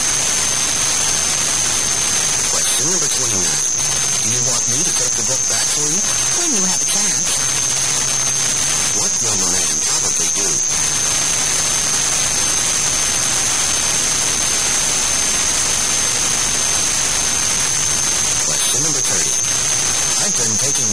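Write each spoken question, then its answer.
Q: What will the man probably do?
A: Take the book back when he has a chance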